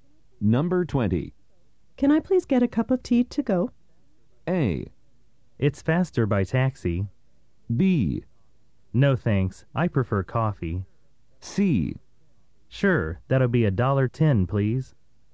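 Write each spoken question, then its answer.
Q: Can I please get a cup of tea to go?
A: C: Sure, that'll be $1.10, please.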